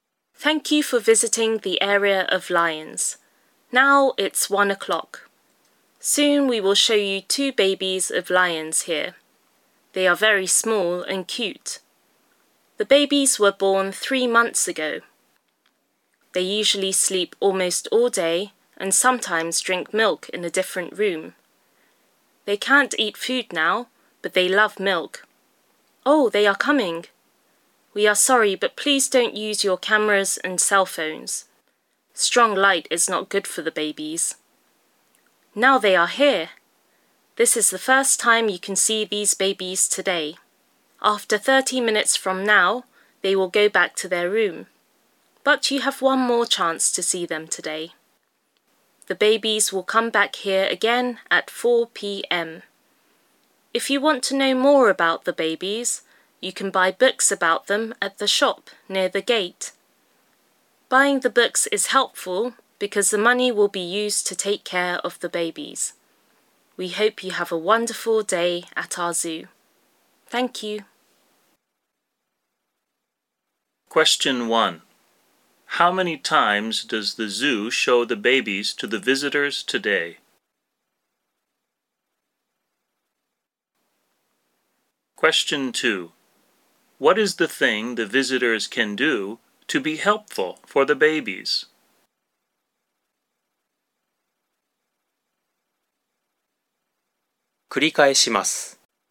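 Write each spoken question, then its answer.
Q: How many times does the zoo show the babies to the visitors today?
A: Twice

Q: What is the thing the visitors can do to be helpful for the babies?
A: Buy books about the babies at the shop near the gate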